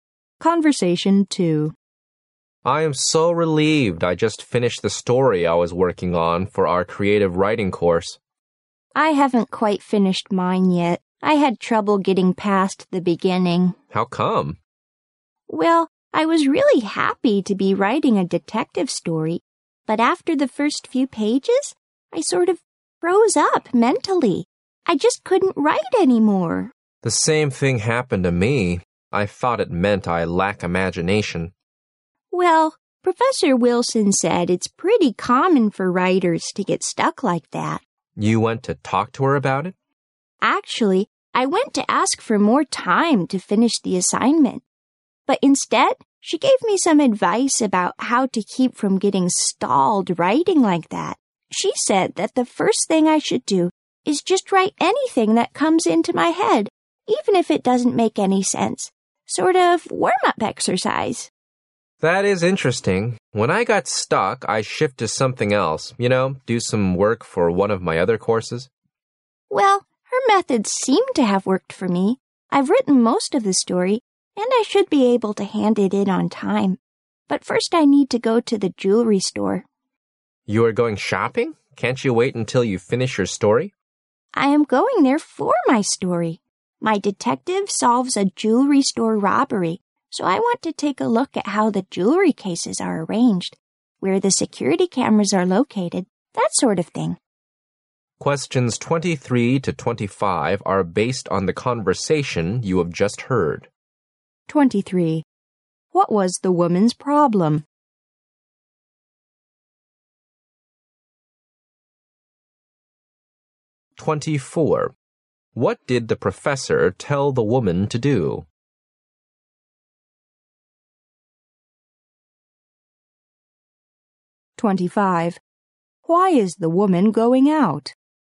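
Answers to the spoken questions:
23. She got stuck and couldn't write after the first few pages
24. Write anything that comes into her head as a warm-up
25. To look at a jewelry store for her story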